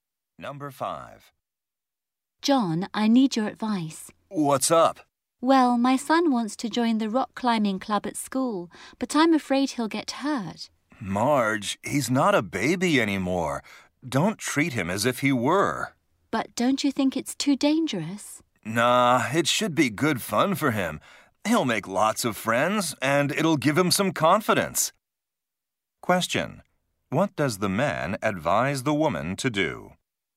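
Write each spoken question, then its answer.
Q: What does the man advise the woman to do?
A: Let her son join the rock climbing club and stop treating him like a baby.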